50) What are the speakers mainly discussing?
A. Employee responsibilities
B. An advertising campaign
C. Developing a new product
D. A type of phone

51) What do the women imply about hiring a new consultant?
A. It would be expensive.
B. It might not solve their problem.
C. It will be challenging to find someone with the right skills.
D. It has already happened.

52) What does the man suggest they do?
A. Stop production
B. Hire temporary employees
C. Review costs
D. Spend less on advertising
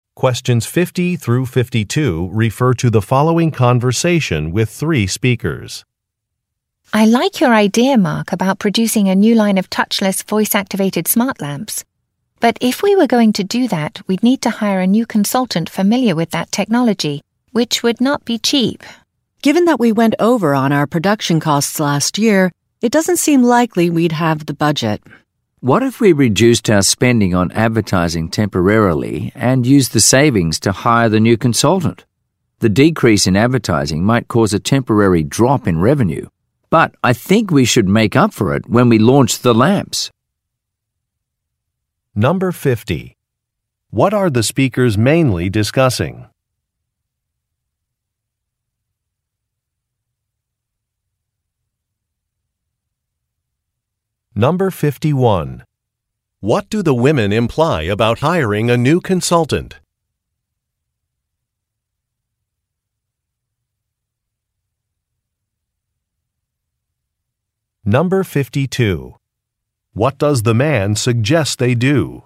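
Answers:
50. Developing a new product
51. It would be expensive.
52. Spend less on advertising

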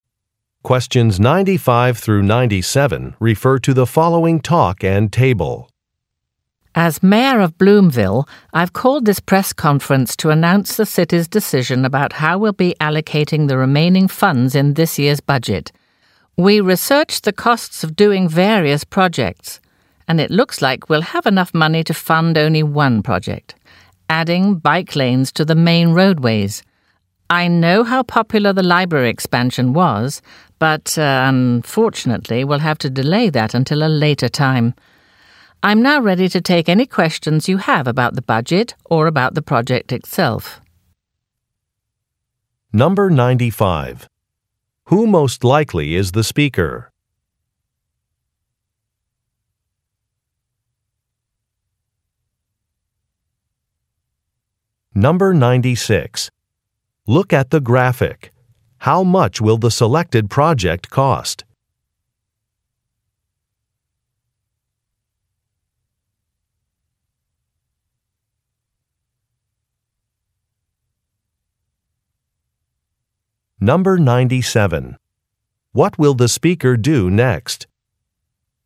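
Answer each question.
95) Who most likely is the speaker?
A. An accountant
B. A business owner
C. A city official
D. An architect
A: A city official

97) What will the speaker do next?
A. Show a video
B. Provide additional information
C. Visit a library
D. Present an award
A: Provide additional information

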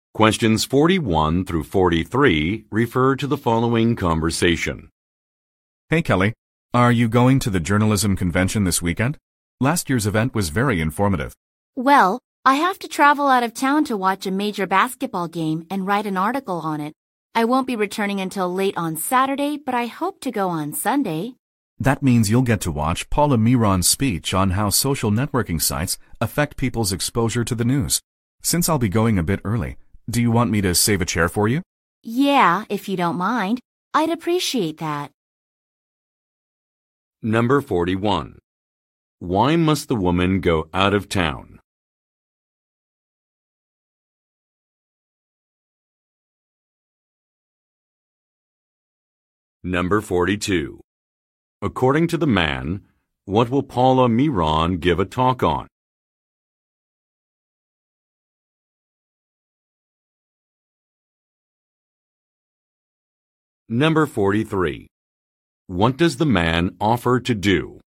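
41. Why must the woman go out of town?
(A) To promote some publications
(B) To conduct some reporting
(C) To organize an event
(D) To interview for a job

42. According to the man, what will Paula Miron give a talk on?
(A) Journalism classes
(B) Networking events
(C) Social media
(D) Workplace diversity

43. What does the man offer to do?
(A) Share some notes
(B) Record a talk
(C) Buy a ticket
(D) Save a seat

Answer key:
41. To conduct some reporting
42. Social media
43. Save a seat

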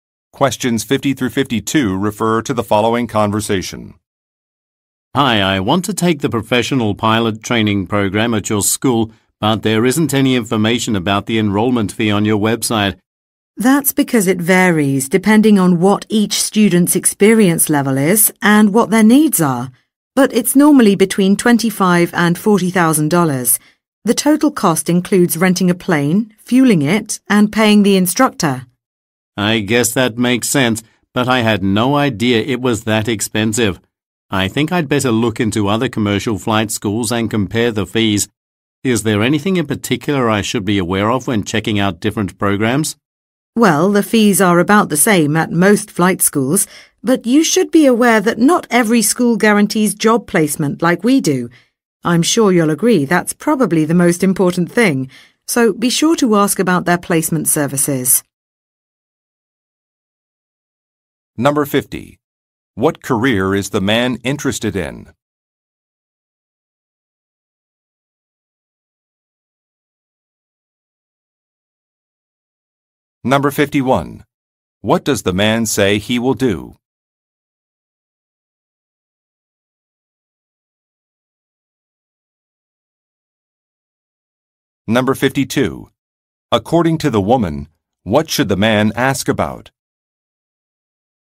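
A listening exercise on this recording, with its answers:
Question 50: What career is the man interested in?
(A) Flight dispatcher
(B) Customs agent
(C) Aircraft mechanic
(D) Commercial pilot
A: Commercial pilot

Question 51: What does the man say he will do?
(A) Obtain a loan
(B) Look at a handbook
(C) Compare different schools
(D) Submit some documents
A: Compare different schools

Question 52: According to the woman, what should the man ask about?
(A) Job placement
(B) Facility size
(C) Experience requirements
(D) Course length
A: Job placement

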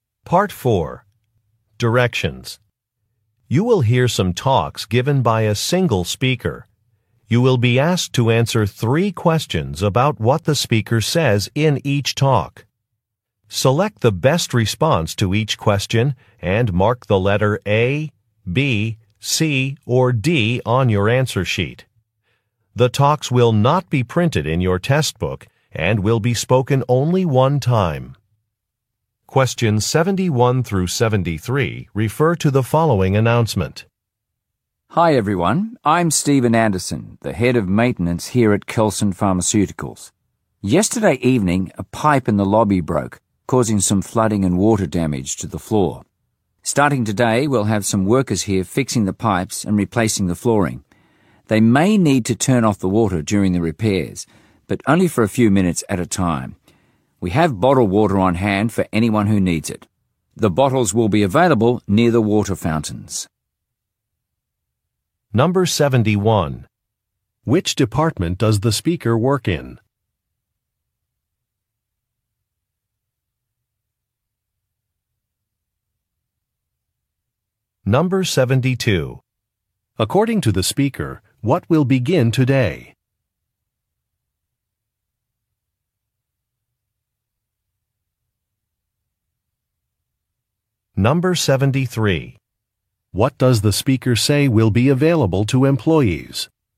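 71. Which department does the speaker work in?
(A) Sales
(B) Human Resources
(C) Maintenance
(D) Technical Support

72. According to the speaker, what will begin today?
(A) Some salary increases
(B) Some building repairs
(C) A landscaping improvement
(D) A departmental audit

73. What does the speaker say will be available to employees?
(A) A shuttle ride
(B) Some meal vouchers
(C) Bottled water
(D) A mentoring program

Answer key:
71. Maintenance
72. Some building repairs
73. Bottled water

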